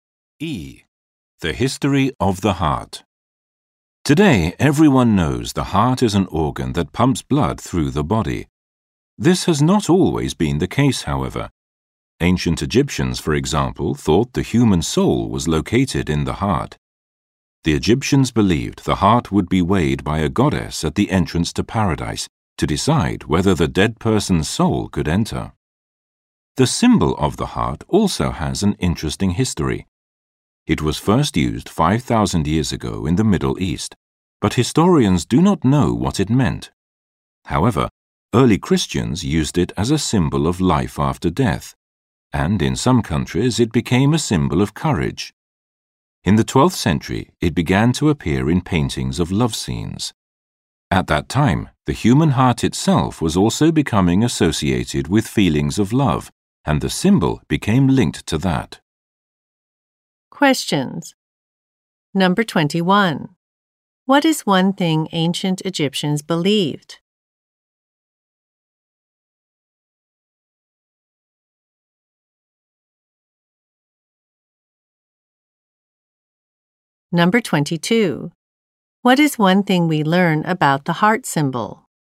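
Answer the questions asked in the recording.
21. The human soul was located in the heart.
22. Its original meaning is unknown, and it later became linked with love.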